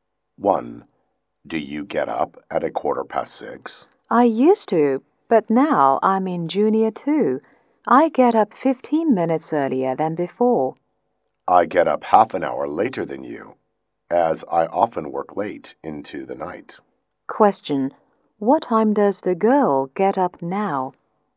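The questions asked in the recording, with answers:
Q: What time does the girl get up now?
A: At 6:00.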